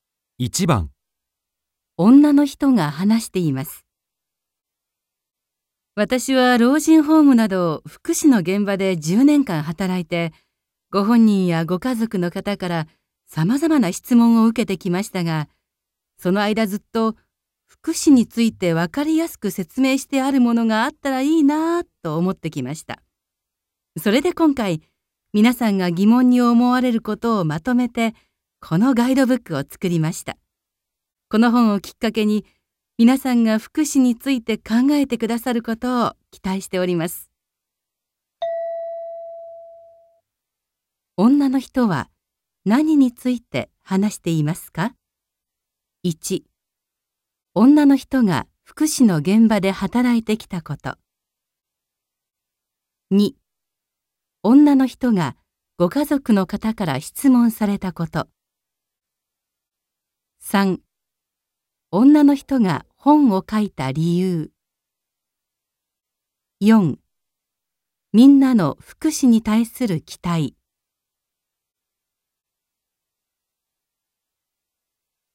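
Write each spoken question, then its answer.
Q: 女の人は何について話していますか?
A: 3: 女の人が本を書いた理由。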